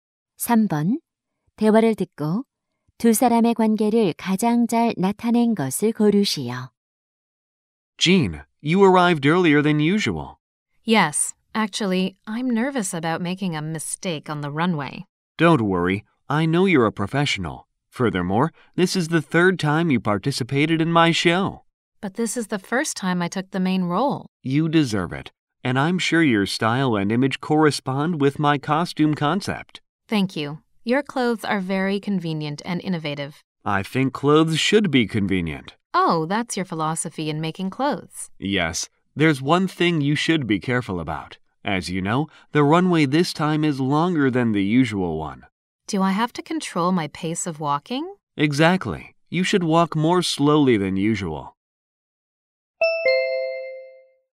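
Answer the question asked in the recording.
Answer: 패션 디자이너 - 모델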